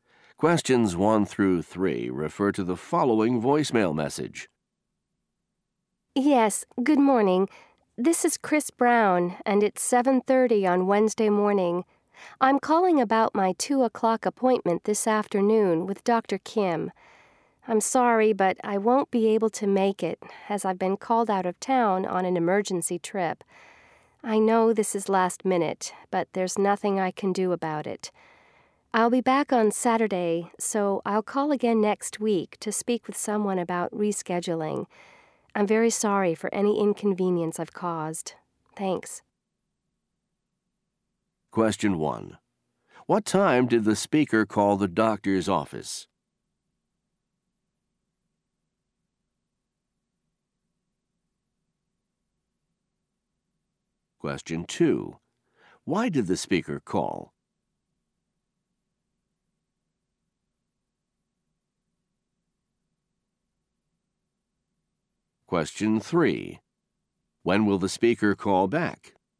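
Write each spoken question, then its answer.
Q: What time did the speaker call the doctor's office?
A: 7:30 in the morning

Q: Why did the speaker call?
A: To cancel his 2 o'clock appointment

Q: When will the speaker call back?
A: Next week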